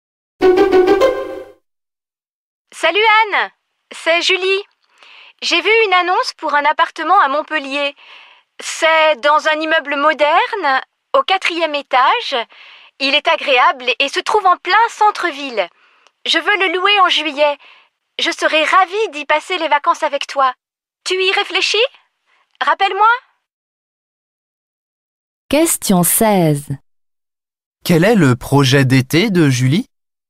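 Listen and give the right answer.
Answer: Louer un appartement à Montpellier en juillet pour y passer les vacances avec Anne.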